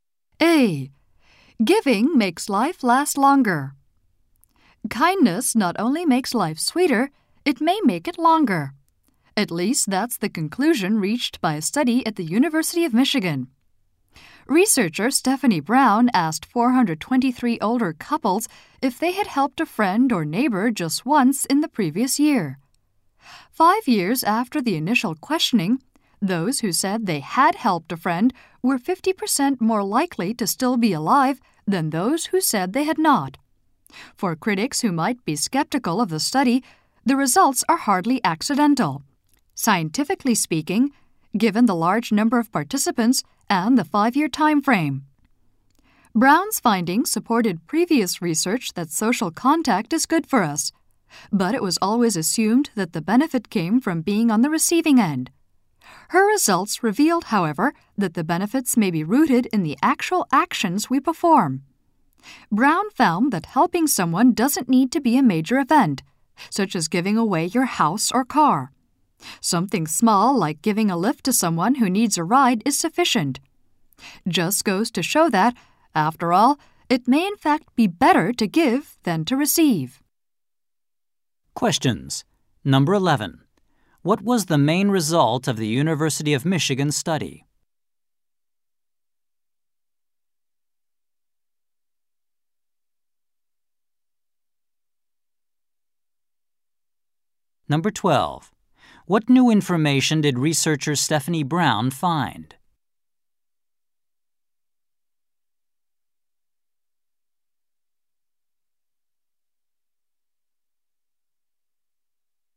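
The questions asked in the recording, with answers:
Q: What was the main result of the University of Michigan study?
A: Older people who helped others were 50% more likely to still be alive five years later.

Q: What new information did researcher Stephanie Brown find?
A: The benefit comes from giving help, not from receiving it.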